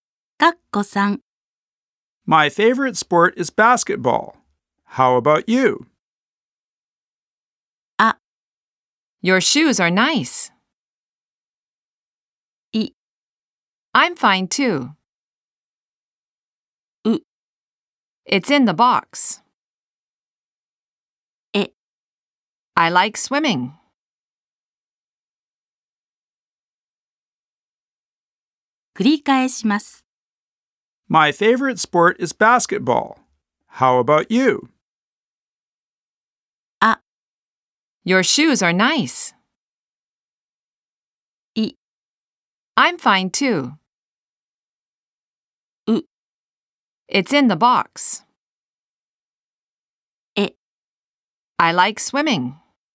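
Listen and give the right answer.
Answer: E: I like swimming.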